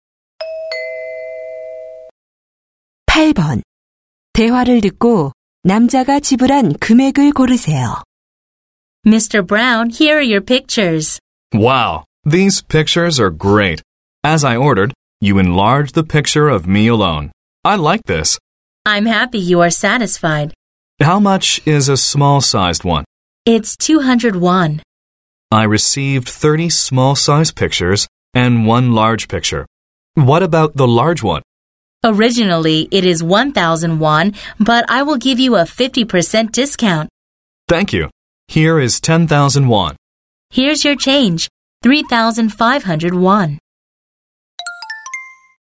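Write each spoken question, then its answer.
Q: 대화를 듣고 남자가 지불한 금액을 고르세요.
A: 6,500원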